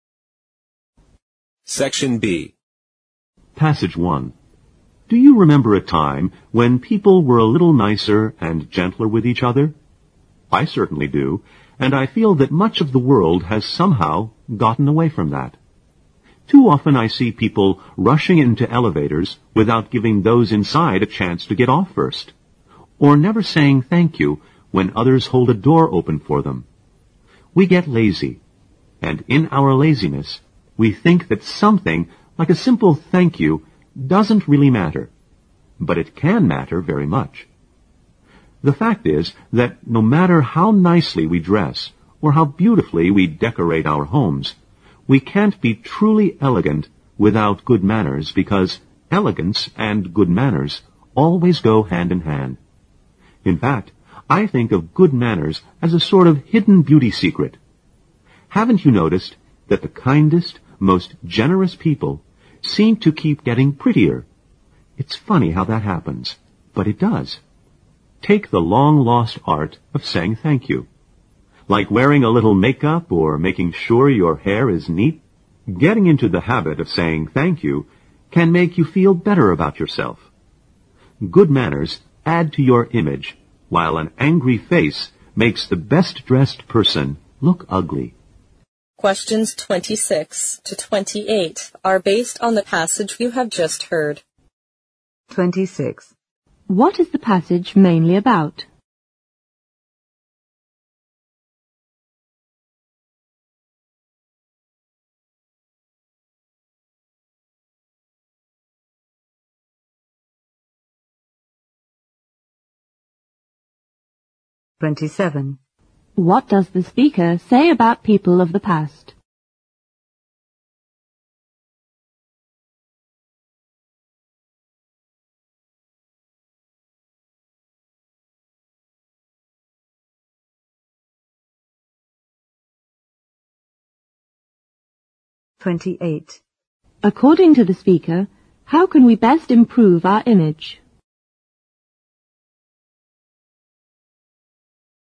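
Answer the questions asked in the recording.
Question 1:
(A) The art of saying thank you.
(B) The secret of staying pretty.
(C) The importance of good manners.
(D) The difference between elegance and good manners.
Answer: (C) The importance of good manners.
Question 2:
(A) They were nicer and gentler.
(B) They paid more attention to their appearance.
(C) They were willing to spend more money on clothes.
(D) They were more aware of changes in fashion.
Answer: (A) They were nicer and gentler.
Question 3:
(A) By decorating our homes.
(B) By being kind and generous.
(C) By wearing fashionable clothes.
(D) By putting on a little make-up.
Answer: (B) By being kind and generous.

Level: 四级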